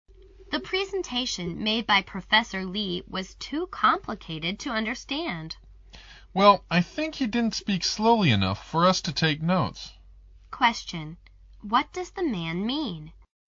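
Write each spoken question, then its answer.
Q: What does the man mean?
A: Professor Lee spoke too fast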